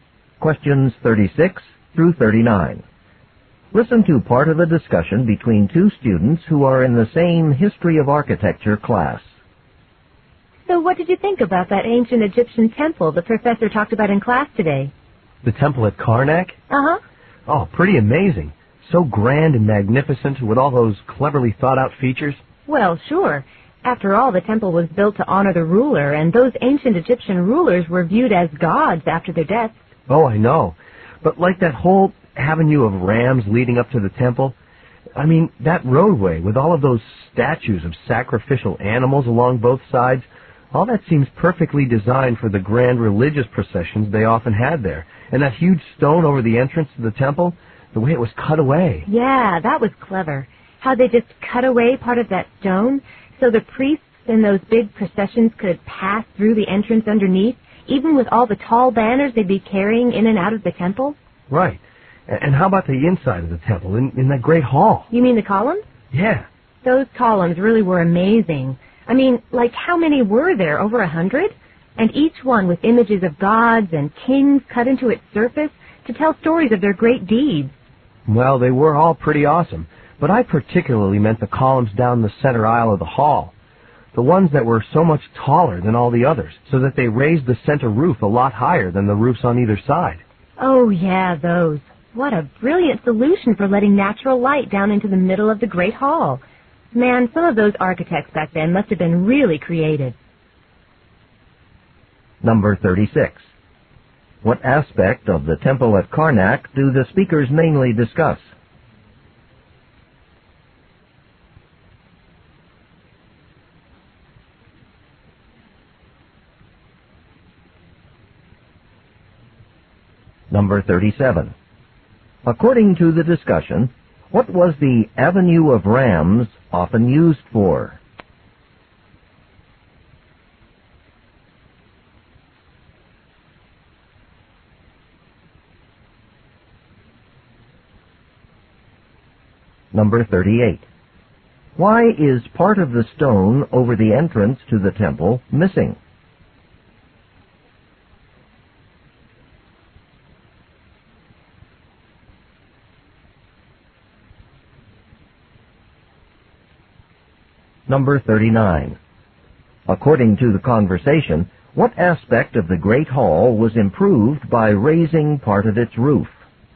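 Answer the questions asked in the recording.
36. Its clever architectural features.
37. Religious processions.
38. So priests carrying tall banners could pass under it.
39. The natural lighting.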